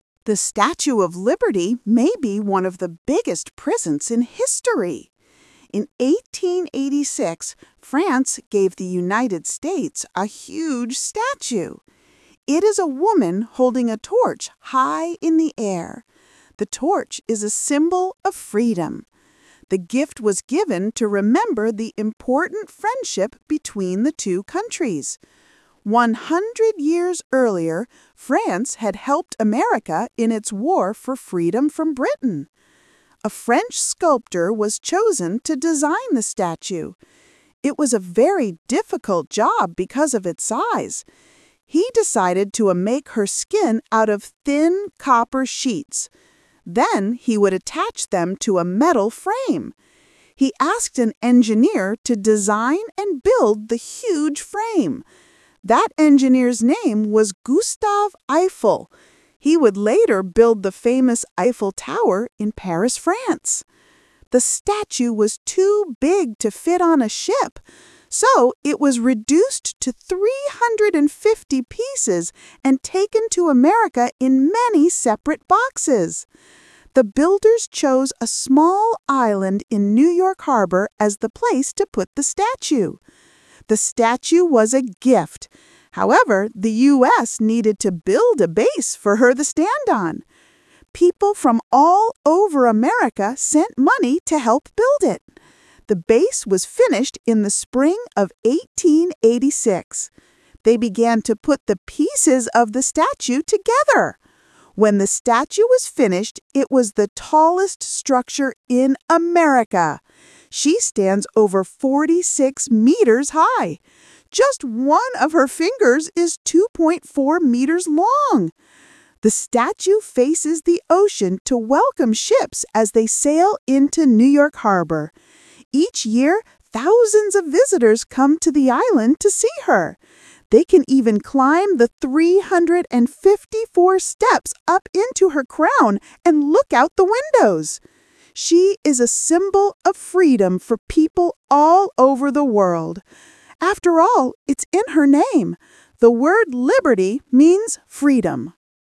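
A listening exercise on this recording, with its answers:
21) Why did France give the statue to the United States?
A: To remember the friendship between France and America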